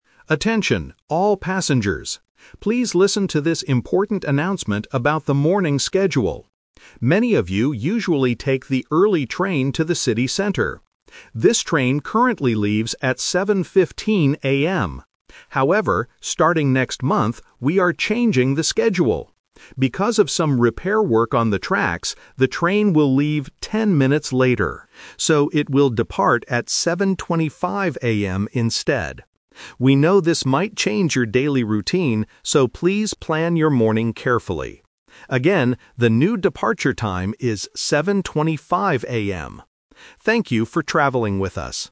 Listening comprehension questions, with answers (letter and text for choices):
Listen to the announcement and choose the correct answer (A, B, or C).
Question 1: What time does the early train leave now?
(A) 7:10 AM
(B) 7:15 AM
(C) 7:25 AM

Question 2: Why is the train schedule changing next month?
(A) Because of repair work.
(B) Because the train is always late.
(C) Because there are too many passengers.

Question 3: What is the new departure time for the early train?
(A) 7:05 AM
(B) 7:15 AM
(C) 7:25 AM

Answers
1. (B) 7:15 AM
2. (A) Because of repair work.
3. (C) 7:25 AM

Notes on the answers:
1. The announcer says, "This train currently leaves at 7:15 AM." Option C (7:25 AM) is a trap because that is the new schedule for next month. Option A is not mentioned.
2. The announcer clearly states, "Because of some repair work on the tracks, the train will leave 10 minutes later." Options B and C are plausible reasons for a schedule change, but they are not mentioned in the audio.
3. The announcer says the train will leave "10 minutes later. So, it will depart at 7:25 AM instead." Option B (7:15 AM) is a trap because it is the current departure time. Option A is a math trap (subtracting instead of adding 10 minutes).

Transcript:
Announcer: Attention, all passengers. Please listen to this important announcement about the morning schedule. Many of you usually take the early train to the city center. This train currently leaves at 7:15 AM. However, starting next month, we are changing the schedule. Because of some repair work on the tracks, the train will leave 10 minutes later. So, it will depart at 7:25 AM instead. We know this might change your daily routine, so please plan your morning carefully. Again, the new departure time is 7:25 AM. Thank you for traveling with us.

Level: A2